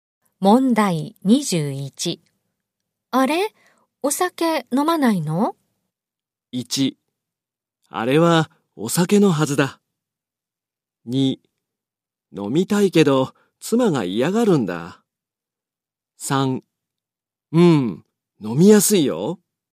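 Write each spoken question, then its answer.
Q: あれ?お酒飲まないの?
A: 2: 飲みたいけど妻が嫌がるんだ。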